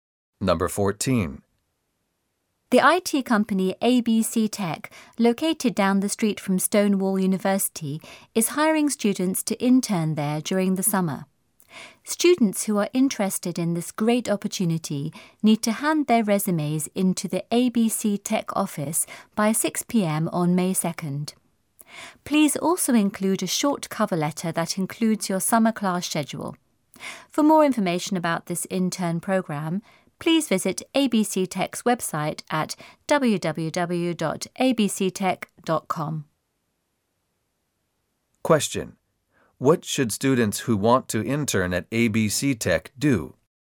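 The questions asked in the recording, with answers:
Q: What should students who want to intern at ABC Tech do?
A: Hand in a resume and a cover letter with their summer class schedule by 6 p.m. on May 2nd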